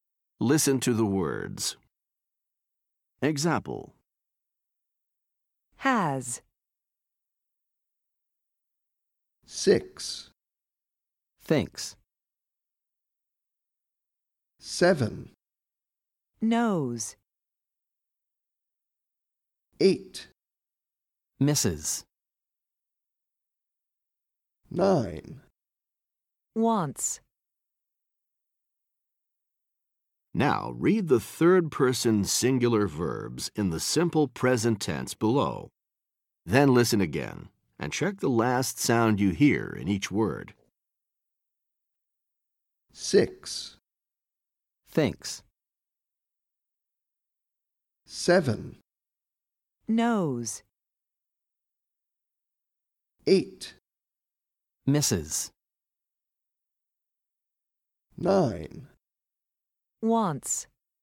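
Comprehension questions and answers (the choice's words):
Listen to the words. Then choose the last sound you hear in each word.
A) /s/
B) /z/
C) /Iz/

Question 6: thinks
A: /s/

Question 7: knows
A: /z/

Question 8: misses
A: /Iz/

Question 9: wants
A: /s/

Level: Top Notch 1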